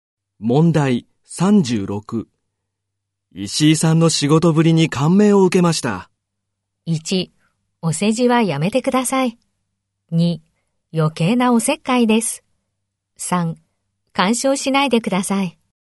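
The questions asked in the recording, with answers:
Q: 石井さんの仕事ぶりに感銘を受けました。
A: 1: お世辞はやめてください。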